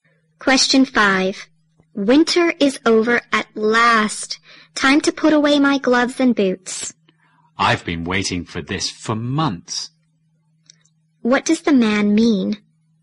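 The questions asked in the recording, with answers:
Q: What does the man mean?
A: He is glad winter is over.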